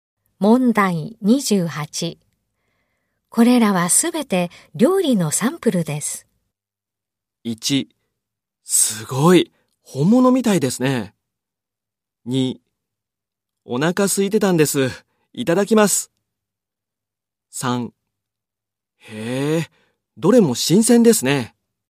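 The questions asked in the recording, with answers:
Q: これらはすべて料理のサンプルです。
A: 1: すごい、本物みたいですね。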